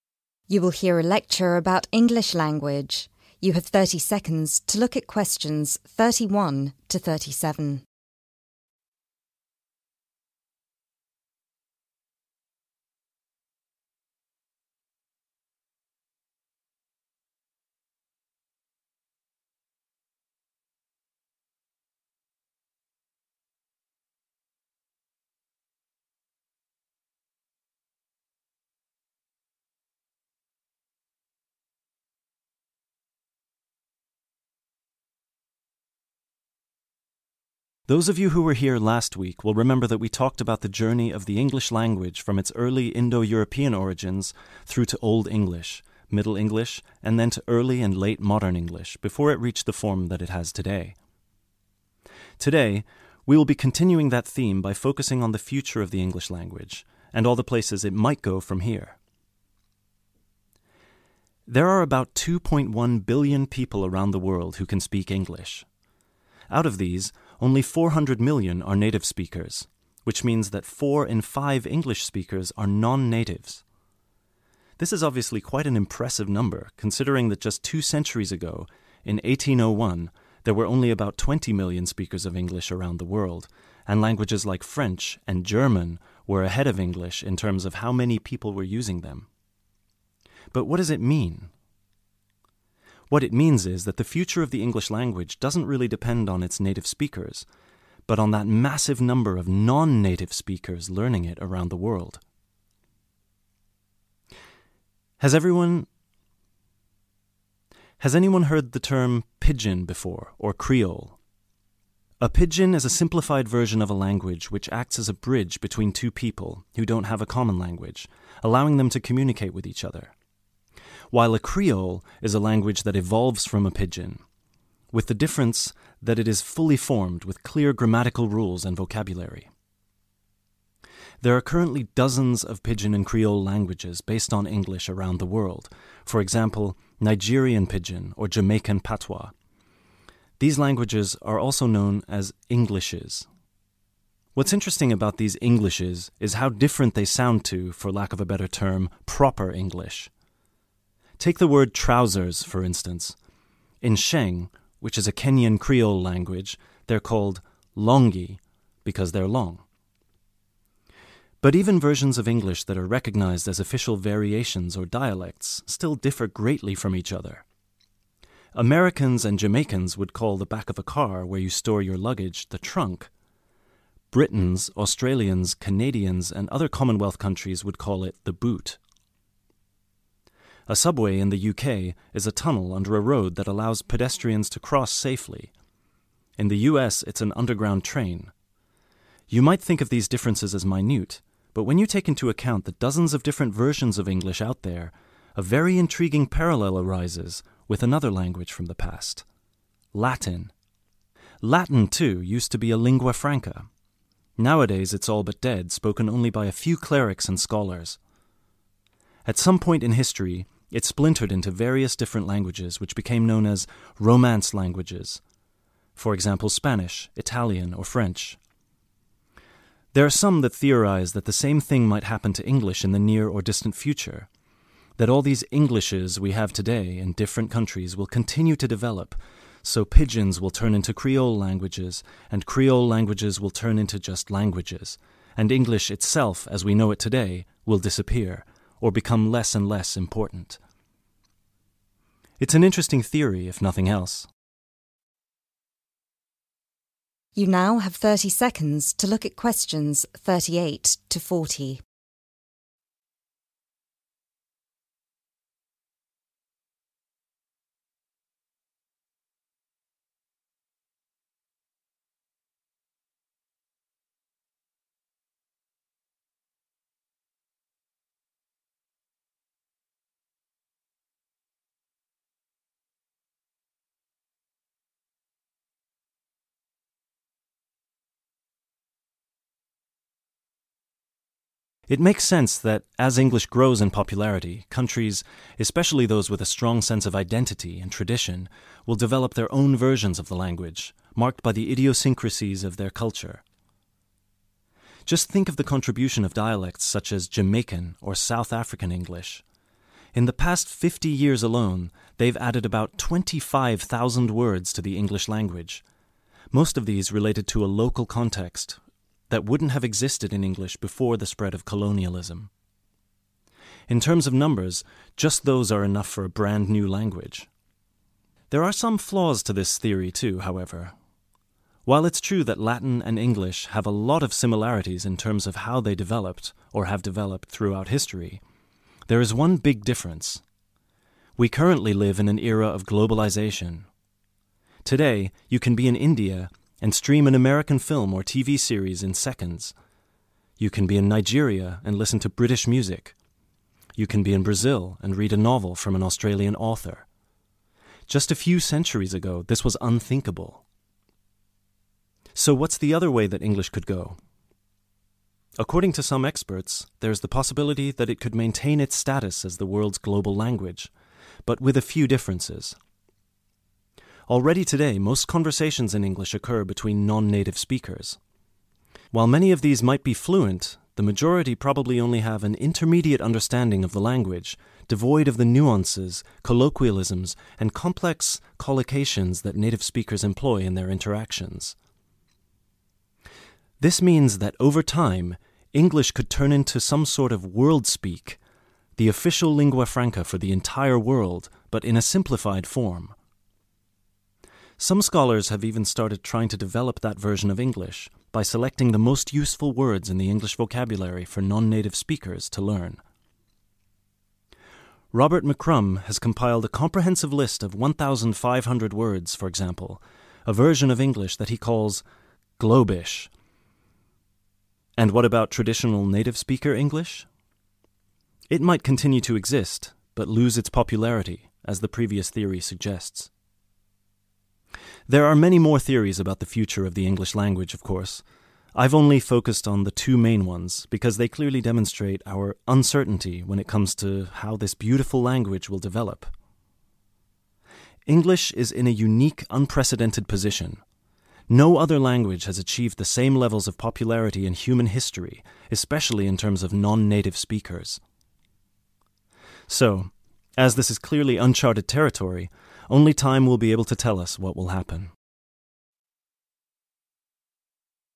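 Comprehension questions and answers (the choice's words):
Answer the questions below, write NO MORE THAN THREE WORDS AND/OR A NUMBER.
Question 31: How many English speakers are there around the world today?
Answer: 2.1 billion

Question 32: Aside from French, which other language does the speaker say was more widely spoken than English in the 19th century?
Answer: German

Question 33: Who does the speaker believe will determine the future of English?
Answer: non-native speakers

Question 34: What is the alternative name for English pidgin and creole languages?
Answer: Englishes

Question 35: What does "longi" mean?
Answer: trousers

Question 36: According to the speaker, which language has a history which is very similar to English?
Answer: Latin

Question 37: What kind of languages are Spanish, French, and Italian?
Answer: Romance languages

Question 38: The speaker says that Jamaican and South African English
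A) are very traditional languages.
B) have greatly influenced the English language.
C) were created very recently.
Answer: have greatly influenced the English language.

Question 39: According to the second theory mentioned by the speaker, English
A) might lose some of its more complex features in a global level.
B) might become even more complicated than it is now.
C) might be called 'Globish'.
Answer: might lose some of its more complex features in a global level.

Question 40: English is a unique language because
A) it has the largest number of speakers in the world.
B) it hasn't changed much throughout human history.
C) it's spoken by a larger number of non-natives than any other language.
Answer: it's spoken by a larger number of non-natives than any other language.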